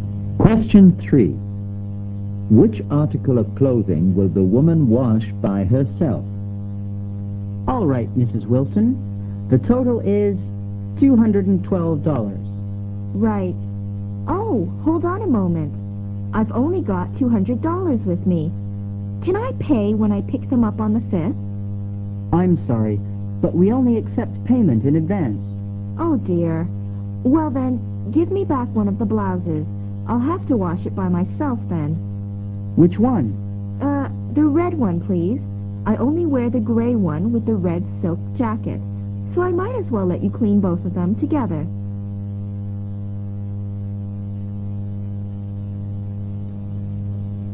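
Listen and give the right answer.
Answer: The red blouse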